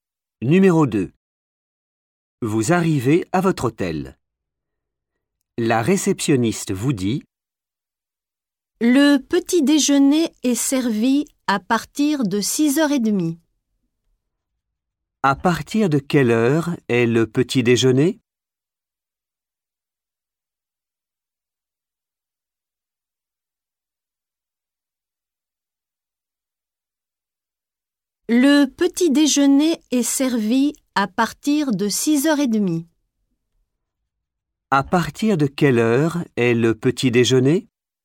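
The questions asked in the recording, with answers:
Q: À partir de quelle heure est le petit déjeuner?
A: 6h30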